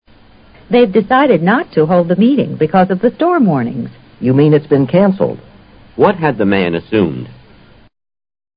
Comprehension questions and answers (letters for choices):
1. What has the man assumed?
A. The storm would last a long time.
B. They would be unable to sell the material.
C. They couldn't reach a decision.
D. The meeting would be held.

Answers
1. A

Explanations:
storm warnings: 暴风雨警报。cancel: 取消。assume:设想。女方说因暴风雨警报而会议不开了。而男方则以为会议取消了,这自然是由于他估计暴风雨会延续一段时间。